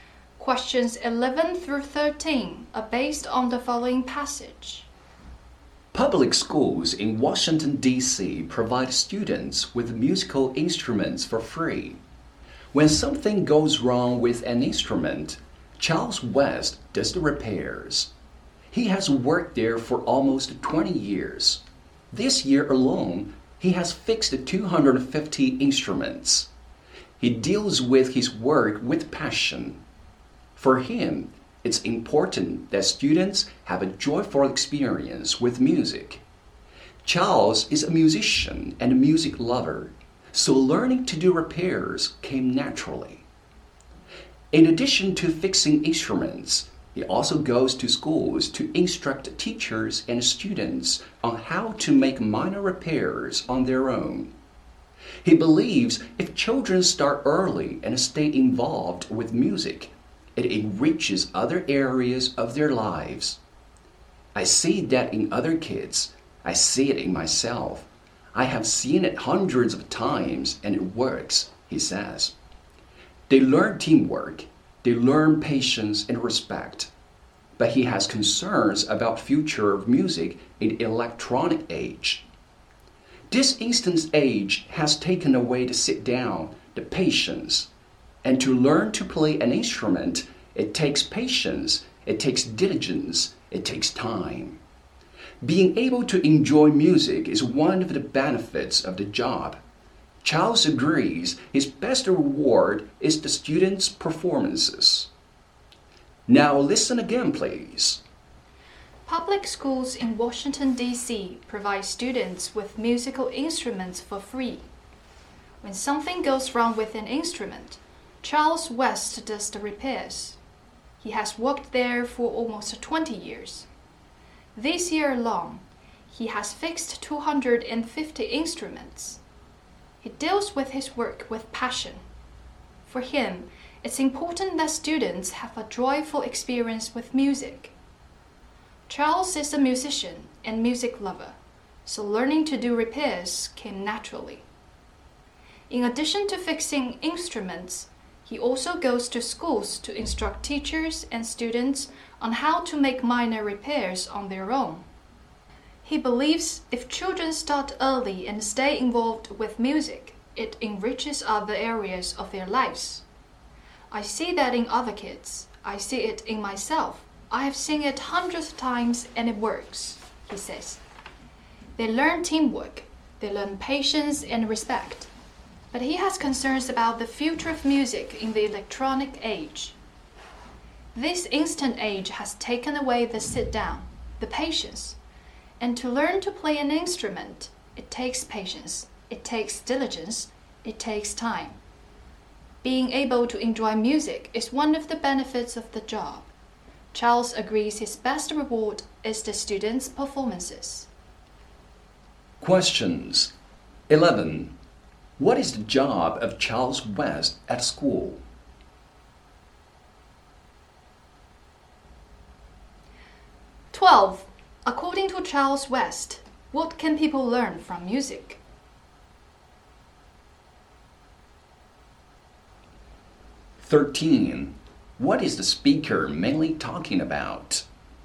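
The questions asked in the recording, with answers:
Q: What is the job of Charles West at school?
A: Repairing musical instruments

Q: According to Charles West, what can people learn from music?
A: Teamwork, patience and respect

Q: What is the speaker mainly talking about?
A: Charles West, who repairs school musical instruments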